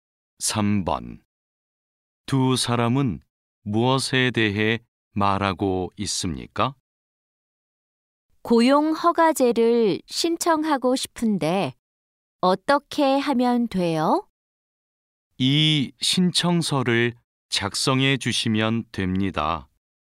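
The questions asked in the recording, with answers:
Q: 두 사람은 무엇에 대해 말하고 있습니까?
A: 고용 허가제 신청 방법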